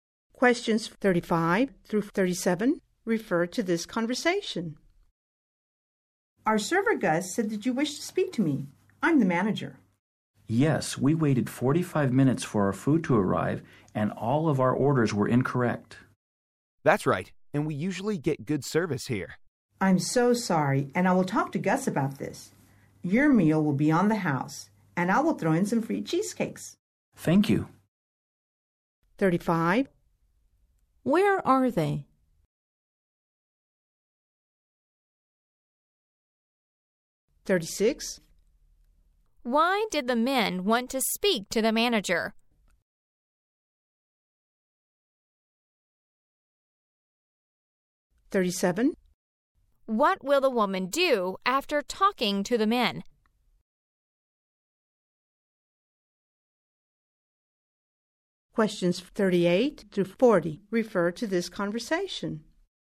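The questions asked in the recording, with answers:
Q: Where are they?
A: In a restaurant

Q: Why did the men want to speak to the manager?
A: They waited 45 minutes and their orders were wrong

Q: What will the woman do after talking to the men?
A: Talk to Gus, the server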